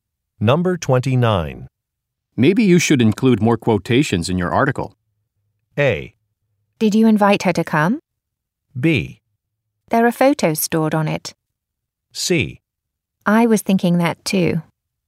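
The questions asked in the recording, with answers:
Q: Maybe you should include more quotations in your article.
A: C: I was thinking that too.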